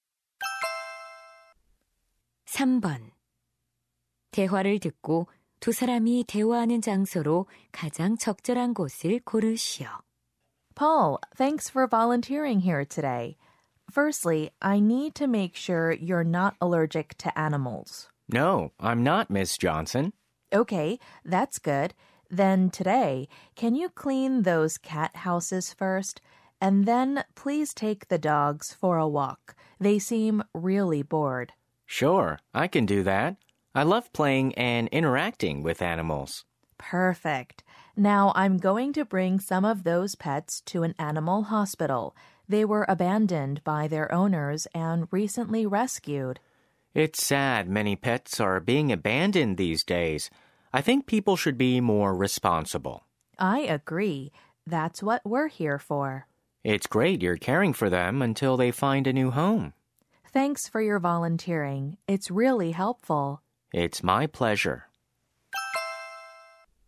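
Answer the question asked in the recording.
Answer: 유기 동물 보호소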